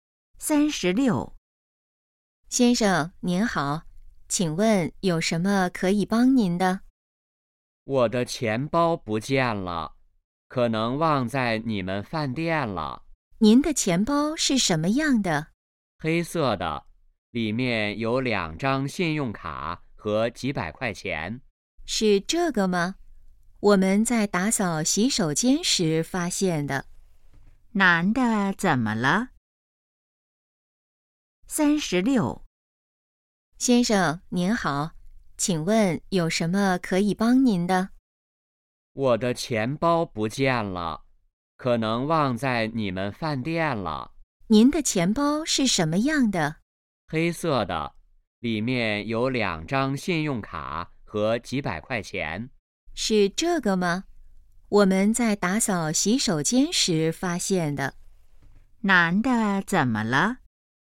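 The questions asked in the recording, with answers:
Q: 男的怎么了?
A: 钱包不见了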